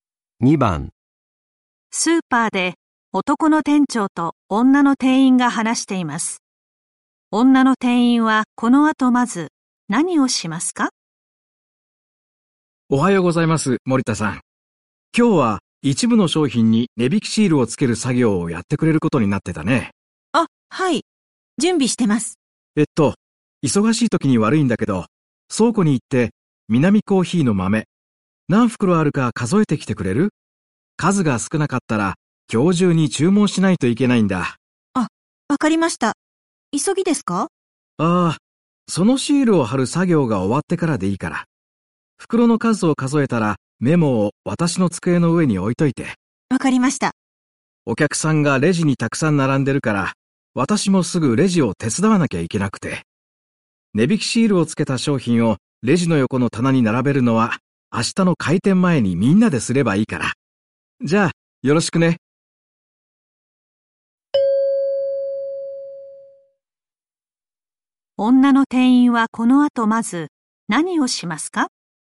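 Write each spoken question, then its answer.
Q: 女の店員はこの後まず何をしますか?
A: 商品に値引きシールをつける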